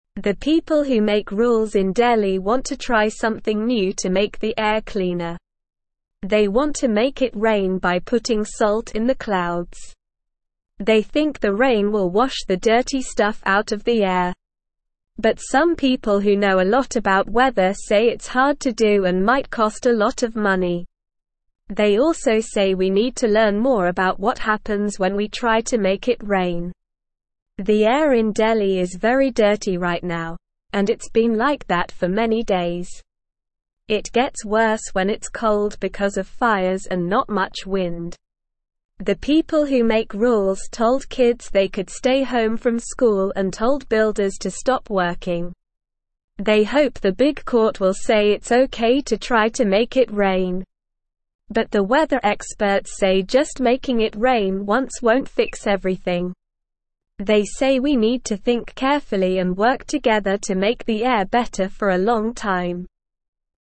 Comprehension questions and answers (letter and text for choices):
Listen and Fill in the Gaps:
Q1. They think the rain will wash the (1)______ (2)______ out of the air.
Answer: dirty

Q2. They think the rain will wash the (1)______ (2)______ out of the air.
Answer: stuff

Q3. But some people who know a lot about weather say it's hard to do and might (3)______ a lot of money.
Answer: cost

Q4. They also say we (4)______ to learn more about what happens when we try to make it rain.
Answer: need

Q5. The air in Delhi is very dirty right now, and it's been like that for (5)______ days.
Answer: many

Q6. It gets worse when it's cold because of (6)______ and not much wind.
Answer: fires

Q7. They say we need to think carefully and (7)______ together to make the air better for a (8)______ time.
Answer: work

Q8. They say we need to think carefully and (7)______ together to make the air better for a (8)______ time.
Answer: long

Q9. What are the people in Delhi trying to make happen?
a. Snow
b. Sunshine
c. Rain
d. Wind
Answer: c. Rain

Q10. Why do the people in Delhi want it to rain?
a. To make the air dirtier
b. To make the air colder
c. To make the air hotter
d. To make the air cleaner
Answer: d. To make the air cleaner

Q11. What do some weather experts say about making it rain in Delhi?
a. It will be very easy to do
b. It won't help make the air cleaner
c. We already know everything about making it rain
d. It might cost a lot of money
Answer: d. It might cost a lot of money

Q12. What happens to the air in Delhi when it's cold?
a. It gets cleaner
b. It gets windier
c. It gets dirtier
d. It stays the same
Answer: c. It gets dirtier

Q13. What did the people who make rules tell kids and builders to do?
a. Stay home from school and stop working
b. Go to school and keep working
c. Stay home from school and keep working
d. Go to school and stop working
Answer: a. Stay home from school and stop working

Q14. What do the weather experts say about just making it rain once?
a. It will fix everything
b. It won't fix everything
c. It will make everything worse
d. It will make everything the same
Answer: b. It won't fix everything

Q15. What do the weather experts say we need to do to make the air better for a long time?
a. Think carefully and work together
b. Do nothing and hope for the best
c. Make it rain every day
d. Make it snow instead of rain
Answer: a. Think carefully and work together

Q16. What do the people in Delhi want the big court to say?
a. It's not okay to try to make it rain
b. It's okay to try to make it rain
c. It's okay to make the air dirtier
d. It's not okay to make the air cleaner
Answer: b. It's okay to try to make it rain

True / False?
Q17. They want to put salt in the clouds to make it rain.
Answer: True

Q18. The weather experts say just making it snow once won't fix everything and we need to work together to make the air worse for a long time.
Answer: False

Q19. The air gets worse when it's cold because of fires and not much wind.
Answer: True

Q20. The people who make rules told kids they could stay home from school and builders to stop working because of the dirty air.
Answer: True

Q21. The people in Delhi want to try something new to make the air cleaner.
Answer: True

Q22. Some people who know about weather say it's easy to make it rain and might not cost a lot of money.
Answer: False

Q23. The people hope the big court will say it's not okay to try to make it rain.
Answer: False

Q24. The air in Delhi is very clean right now and has been like that for many days.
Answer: False

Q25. What do the people who make rules in Delhi want to try to make the air cleaner?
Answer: They want to make it rain by putting salt in the clouds.

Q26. What will they put in the clouds to try to make it rain?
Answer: They will put salt in the clouds.

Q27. Why do they want to make it rain?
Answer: They want the rain to wash the dirty stuff out of the air.

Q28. Why is the air in Delhi very dirty right now?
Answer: The air is dirty because of fires and not much wind, and it's worse when it's cold.

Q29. What did the rule makers tell kids and builders to do because of the dirty air?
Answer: They told kids to stay home from school and told builders to stop working.

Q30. Who do the rule makers hope will say it's okay to try to make it rain?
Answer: They hope the big court will say it's okay.

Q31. Do the weather experts think making it rain once will make the air clean forever?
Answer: No, they say just making it rain once won't fix everything.

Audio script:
The people who make rules in Delhi want to try something new to make the air cleaner. They want to make it rain by putting salt in the clouds. They think the rain will wash the dirty stuff out of the air. But some people who know a lot about weather say it's hard to do and might cost a lot of money. They also say we need to learn more about what happens when we try to make it rain.
The air in Delhi is very dirty right now, and it's been like that for many days. It gets worse when it's cold because of fires and not much wind. The people who make rules told kids they could stay home from school and told builders to stop working. They hope the big court will say it's okay to try to make it rain. But the weather experts say just making it rain once won't fix everything. They say we need to think carefully and work together to make the air better for a long time.

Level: Level 1